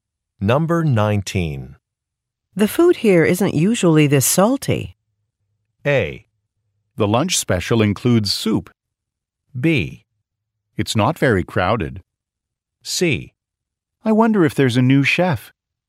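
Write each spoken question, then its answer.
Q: The food here isn't usually this salty.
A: C: I wonder if there's a new chef.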